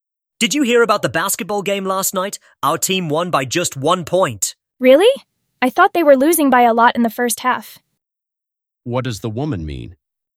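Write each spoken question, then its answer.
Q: What does the woman mean?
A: She is surprised the team won because they were far behind in the first half.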